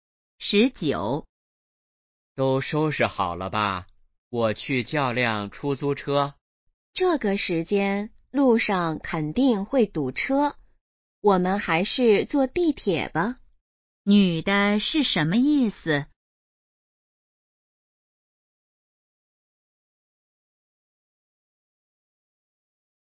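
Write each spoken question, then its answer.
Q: 女的是什么意思?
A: 坐地铁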